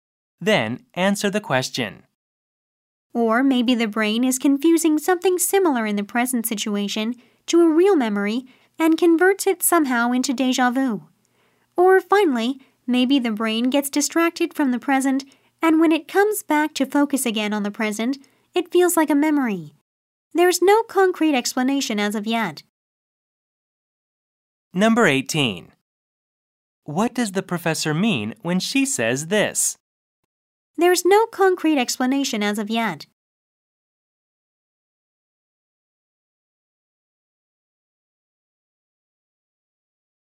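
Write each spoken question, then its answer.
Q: What does the professor mean when she says this?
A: Scientists do not yet know for certain what causes déjà vu; the possible explanations are only theories.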